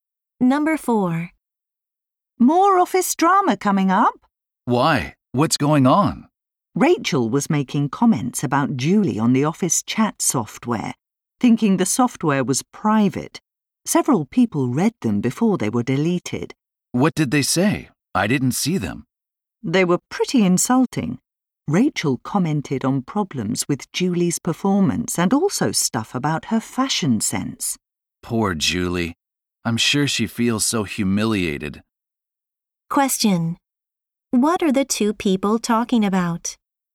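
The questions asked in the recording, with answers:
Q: What are the two people talking about?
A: Insulting comments Rachel made about Julie in the office chat that other people saw.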